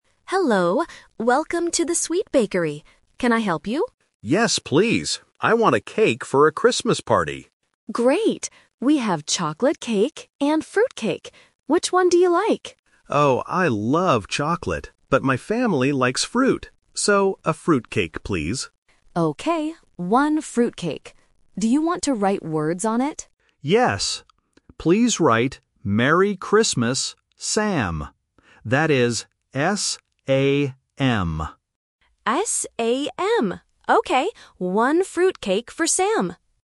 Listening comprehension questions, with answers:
Listen to the conversation and choose the correct answer (A, B, or C).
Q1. What party is the cake for?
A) A birthday party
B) A New Year party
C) A Christmas party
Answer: C) A Christmas party

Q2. What kind of cake does the customer buy?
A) A chocolate cake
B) A fruit cake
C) A vanilla cake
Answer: B) A fruit cake

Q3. Who is the cake for?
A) Sam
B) Pam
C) Dan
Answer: A) Sam

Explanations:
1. The customer clearly says, "I want a cake for a Christmas party."
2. The customer says, "So, a fruit cake, please." The baker also confirms, "Okay, one fruit cake."
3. The customer tells the baker to write "Merry Christmas, Sam" and spells it out clearly: "S-A-M."

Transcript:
Baker: Hello! Welcome to the Sweet Bakery. Can I help you?
Customer: Yes, please. I want a cake for a Christmas party.
Baker: Great! We have chocolate cake and fruit cake. Which one do you like?
Customer: Oh, I love chocolate, but my family likes fruit. So, a fruit cake, please.
Baker: Okay, one fruit cake. Do you want to write words on it?
Customer: Yes. Please write "Merry Christmas, Sam". That is S-A-M.

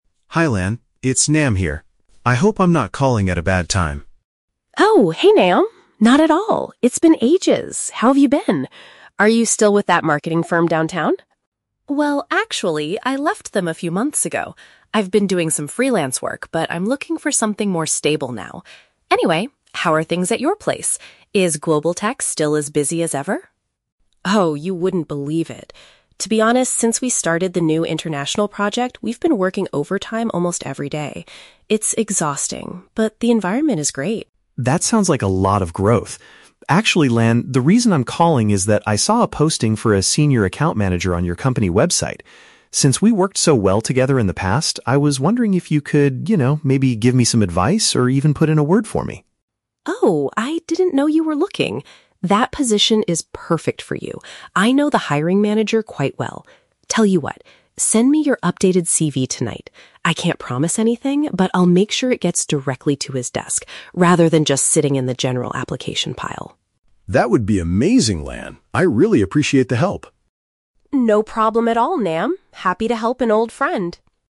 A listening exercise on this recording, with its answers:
Listen to the conversation and choose the best answer (A, B, or C).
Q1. What is the man's current professional situation?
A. He is working full-time for a marketing firm.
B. He is currently working independently but wants a permanent job.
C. He is unemployed and hasn't worked for several months.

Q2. How does the woman describe her current company?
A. The staff are unhappy because they have to work too much.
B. The company is struggling to find new international projects.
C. It is very productive and has a positive atmosphere despite the heavy workload.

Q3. What is the woman going to do to assist the man?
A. She will interview him for the position herself.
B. She will submit his resume directly to the person in charge of hiring.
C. She will give him the contact details of the hiring manager.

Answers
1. B. He is currently working independently but wants a permanent job.
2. C. It is very productive and has a positive atmosphere despite the heavy workload.
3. B. She will submit his resume directly to the person in charge of hiring.

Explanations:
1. In the text, Nam says: "I've been doing some freelance work, but I'm looking for something more stable." Trap: Answer (A) is wrong because he has left his job at the marketing firm ("I left them"). Answer (C) is wrong because he is still working freelance, not that he is unemployed.
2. Lan uses the phrases "working overtime" and "exhausting" (equivalent to heavy workload), but claims "the environment is great" (positive atmosphere). Trap: Answer (A) mentions working overtime but says the employees are "unhappy," which is incorrect. Answer (B) is the complete opposite of the information "started the new international project."
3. Lan promised to "send it directly to his desk" (i.e., the hiring manager). Here, synonyms are used: "CV" = "resume", "hiring manager" = "person in charge of hiring". Trap: Answer (A) is not mentioned. Answer (C) is incorrect because she says Nam sent his CV to her, not that Nam contacted her directly.

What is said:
Nam: Hi Lan! It's Nam here. I hope I'm not calling at a bad time?
Lan: Oh, hey Nam! Not at all. It's been ages! How have you been? Are you still with that marketing firm downtown?
Lan: Well, actually, I left them a few months ago. I've been doing some freelance work, but I'm looking for something more stable now. Anyway, how are things at your place? Is "Global Tech" still as busy as ever?
Lan: Oh, you wouldn't believe it. To be honest, since we started the new international project, we've been working overtime almost every day. It's exhausting, but the environment is great.
Nam: That sounds like a lot of growth. Actually, Lan, the reason I'm calling is that I saw a posting for a Senior Account Manager on your company website. Since we worked so well together in the past, I was wondering if you could... you know, maybe give me some advice or even put in a word for me?
Lan: Oh, I didn't know you were looking! That position is perfect for you. I know the hiring manager quite well. Tell you what—send me your updated CV tonight. I can't promise anything, but I'll make sure it gets directly to his desk rather than just sitting in the general application pile.
Nam: That would be amazing, Lan. I really appreciate the help!

